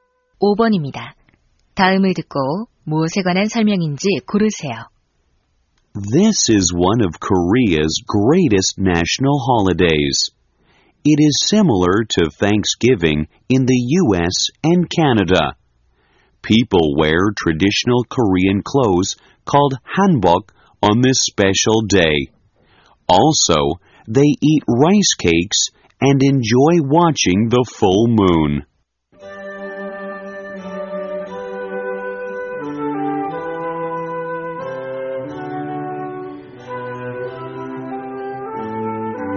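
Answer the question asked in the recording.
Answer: 추석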